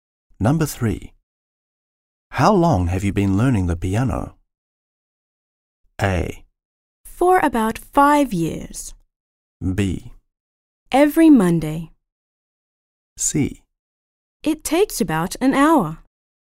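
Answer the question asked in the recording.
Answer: A: For about 5 years.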